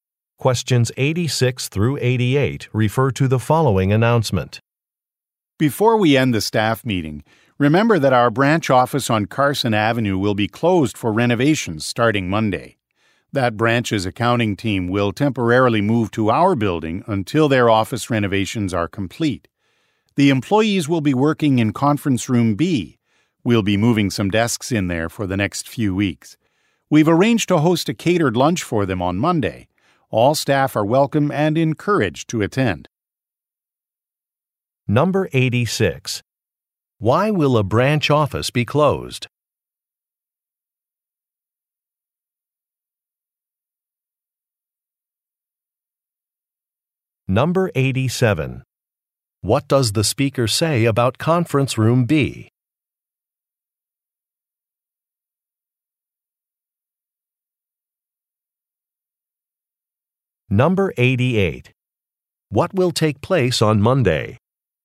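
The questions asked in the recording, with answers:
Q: Why will a branch office be closed?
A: For renovations

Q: What does the speaker say about Conference Room B?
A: A branch accounting team will work there temporarily

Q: What will take place on Monday?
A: A catered lunch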